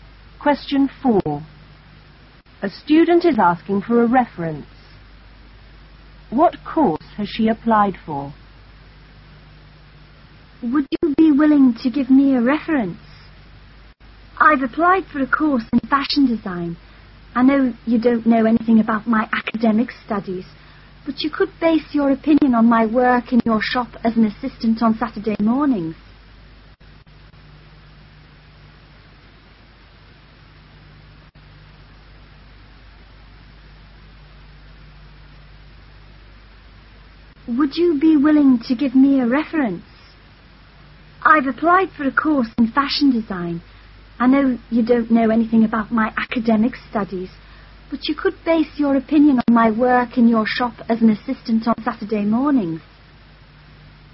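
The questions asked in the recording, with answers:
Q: What course has she applied for?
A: Fashion design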